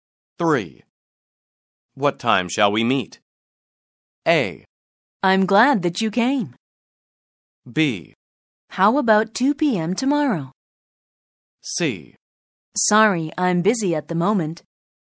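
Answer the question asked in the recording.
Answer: B: How about 2 p.m. tomorrow?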